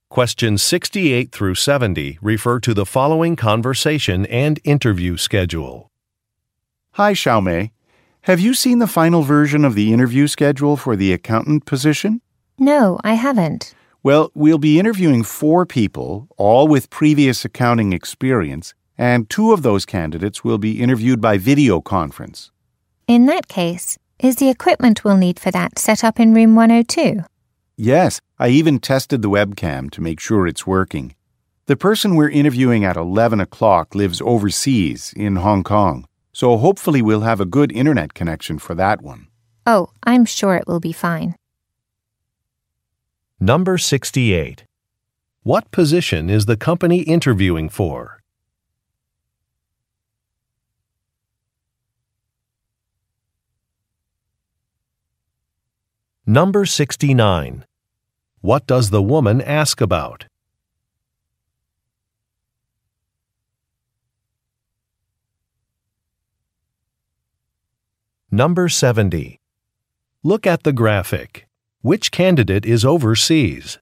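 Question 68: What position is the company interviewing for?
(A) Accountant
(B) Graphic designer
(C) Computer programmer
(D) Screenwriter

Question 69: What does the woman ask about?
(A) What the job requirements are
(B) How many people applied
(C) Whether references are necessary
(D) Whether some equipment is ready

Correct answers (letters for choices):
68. A
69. D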